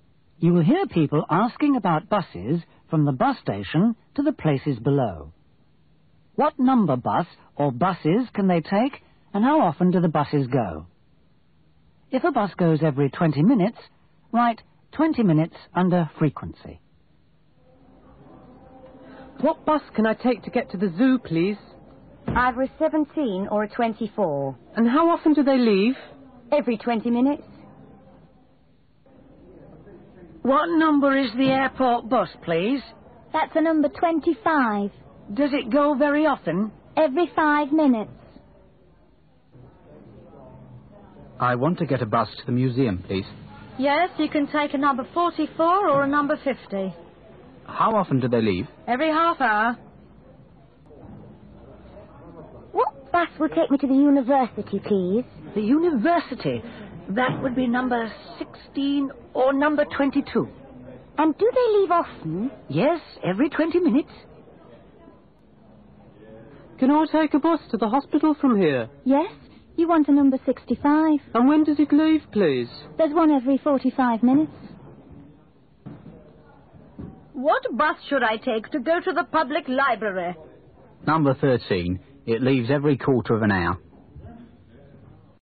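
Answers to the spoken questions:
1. 17 or 24, every 20 minutes
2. 25, every 5 minutes
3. 44 or 50, every half hour
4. 16 or 22, every 20 minutes
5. 65, every 45 minutes
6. 13, every 15 minutes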